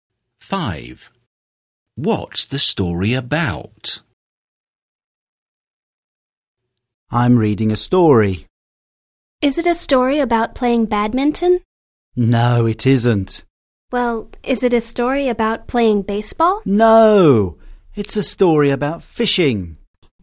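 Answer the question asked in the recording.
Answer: Fishing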